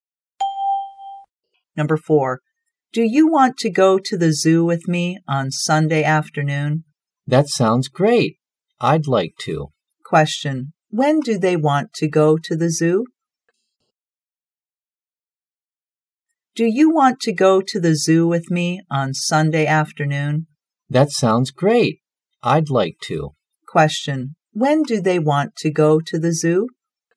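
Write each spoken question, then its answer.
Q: Question, when do they want to go to the zoo?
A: On Sunday afternoon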